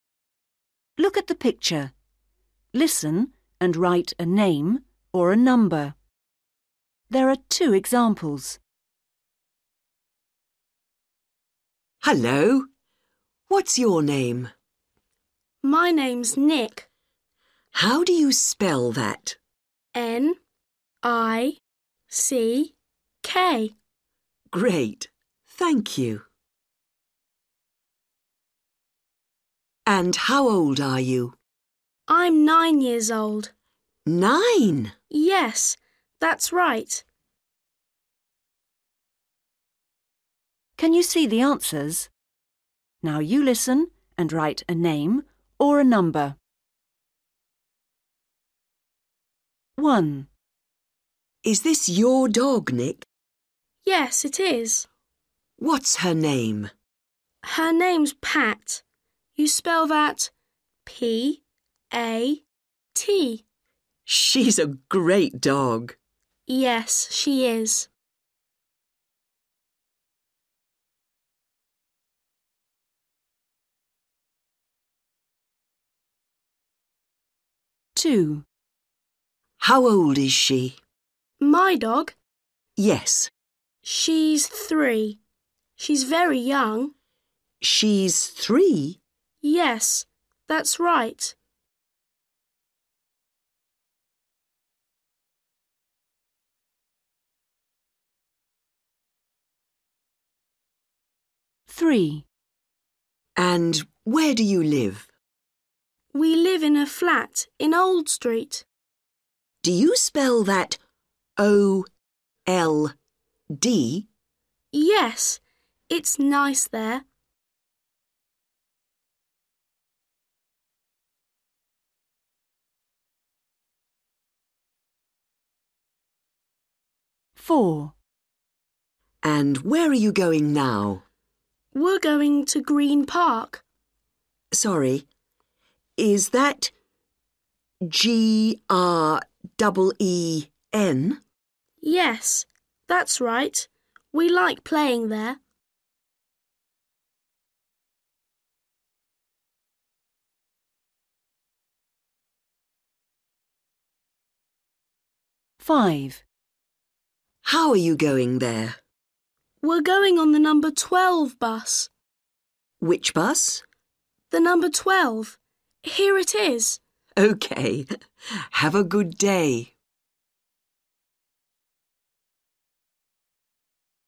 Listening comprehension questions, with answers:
Read the question. Listen and write a name or a number.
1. What's the name of Nick's dog? ...........................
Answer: Pat

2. How old is the dog? ...........................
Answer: 3/three

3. Where is Nick's flat? in ........................... Street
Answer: Old

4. Where is Nick going now? to ........................... Park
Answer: Green

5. What number is Nick's bus? ...........................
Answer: 12/twelve

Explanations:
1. WOMAN: Is this your dog, Nick? BOY: Yes, it is. WOMAN: What's her name? BOY: Her name's Pat. You spell that P-A-T. WOMAN: She's a great dog. BOY: Yes, she is.
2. WOMAN: How old is she? BOY: My dog? WOMAN: Yes. BOY: She's three. She's very young. WOMAN: She's three? BOY: Yes. That's right.
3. WOMAN: And where do you live? BOY: We live in a flat in Old Street. WOMAN: Do you spell that O-L-D? BOY: Yes. It's nice there.
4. WOMAN: And where are you going now? BOY: We're going to Green Park. WOMAN: Sorry ... is that G-R double E-N? BOY: Yes, that's right. We like playing there.
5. WOMAN: How are you going there? BOY: We're going on the number twelve bus. WOMAN: Which bus? BOY: The number twelve. Here it is! WOMAN: Okay. Have a good day!

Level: Starters